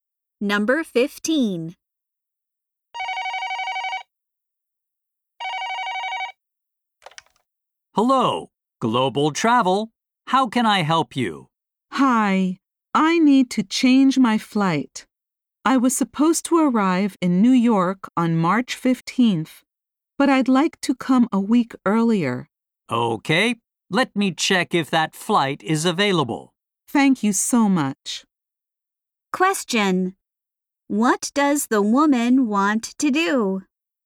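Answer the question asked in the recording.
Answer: Change her flight to arrive a week earlier.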